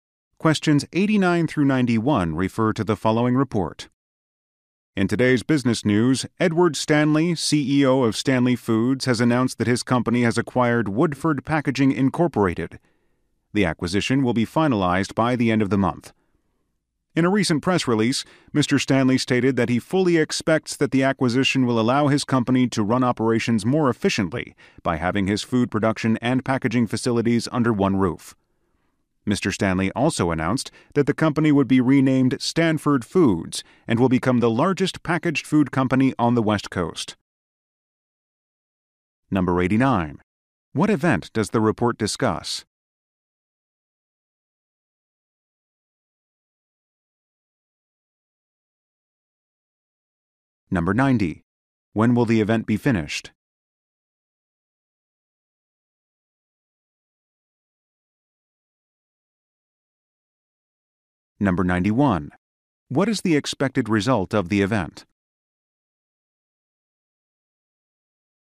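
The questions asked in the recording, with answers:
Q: What event does the report discuss?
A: The acquisition of Woodford Packaging by Stanley Foods

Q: When will the event be finished?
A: By the end of the month

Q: What is the expected result of the event?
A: More efficient operations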